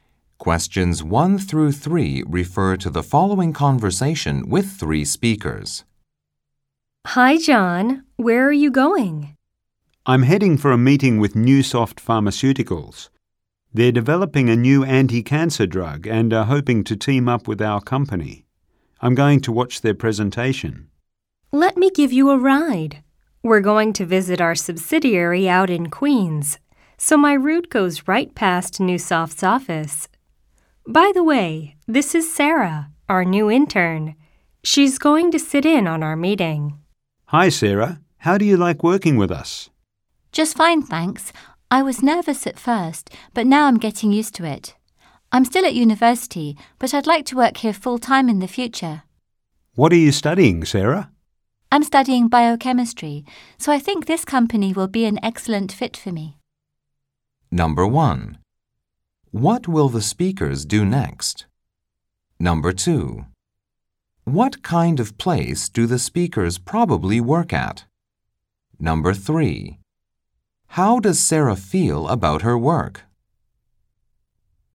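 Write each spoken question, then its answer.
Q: How does Sarah feel about her work?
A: She likes it; she was nervous at first but is getting used to it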